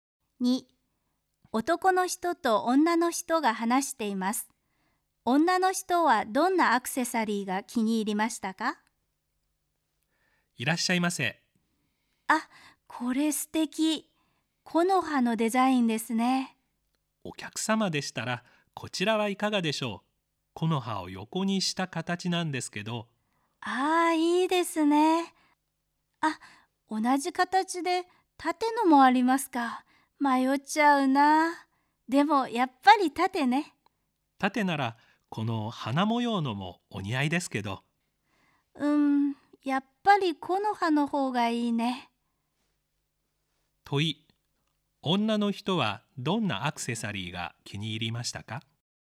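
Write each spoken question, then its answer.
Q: 問い、女の人はどんなアクセサリーが気に入りましたか?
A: 縦の木の葉のデザインのもの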